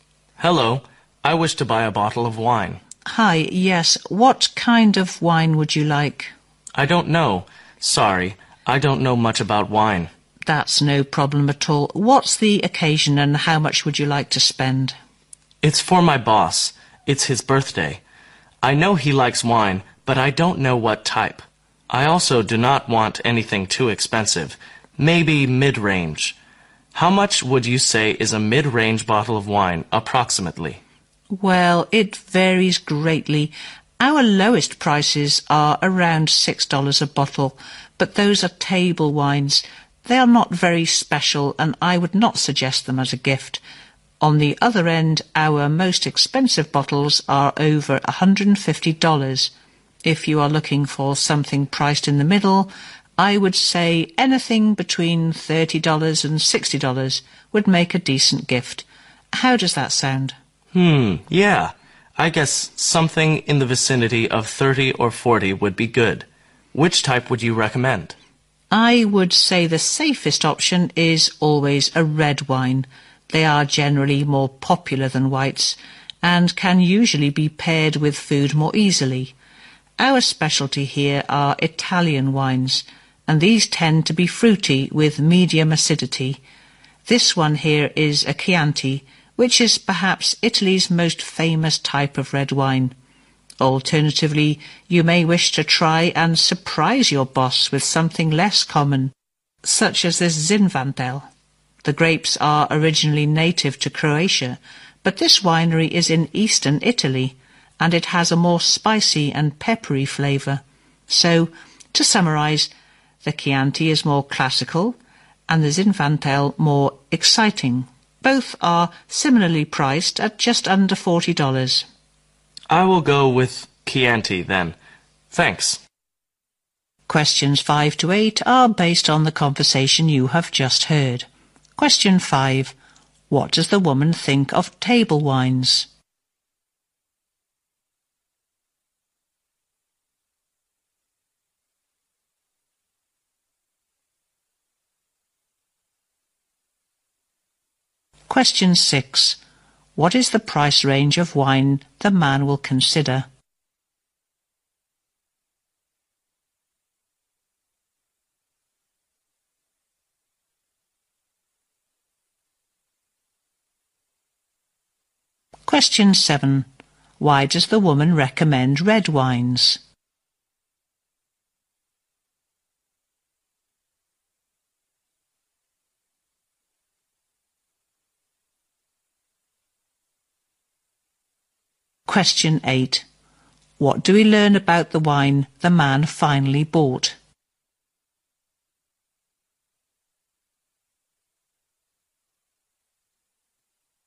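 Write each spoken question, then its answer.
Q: What does the woman think of table wines?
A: They are not very special and not suitable as a gift.

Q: What is the price range of wine the man will consider?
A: Around $30 to $40.

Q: Why does the woman recommend red wines?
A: They are more popular than whites and easier to pair with food.

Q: What do we learn about the wine the man finally bought?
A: It is a Chianti, a classic, famous Italian red priced just under $40.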